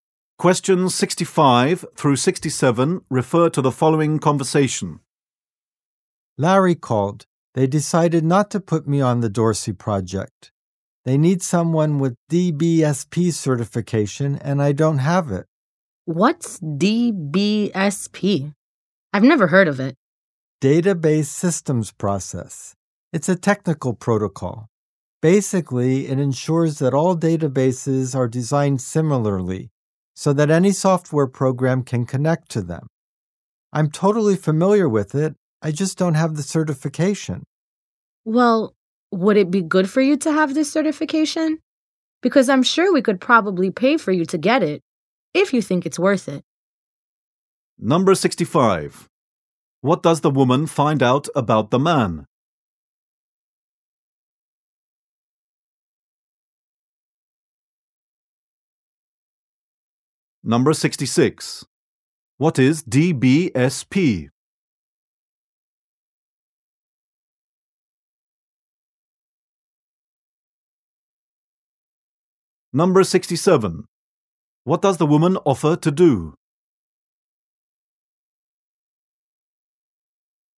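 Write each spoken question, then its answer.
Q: What does the woman find out about the man?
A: He does not have DBSP certification.

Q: What is DBSP?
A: A technical protocol for database systems.

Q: What does the woman offer to do?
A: Pay for him to get the certification.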